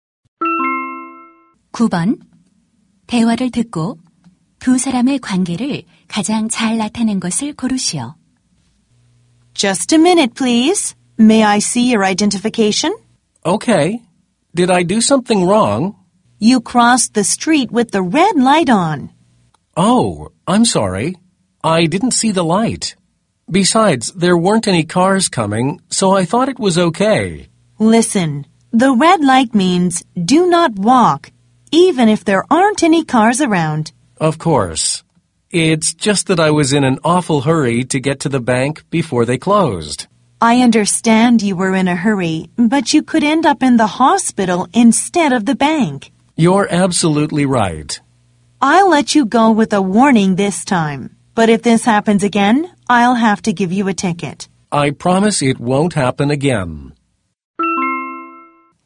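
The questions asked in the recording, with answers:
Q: 대화를 듣고 두 사람의 관계를 가장 잘 나타낸 것을 고르시오.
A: 경찰관 - 보행자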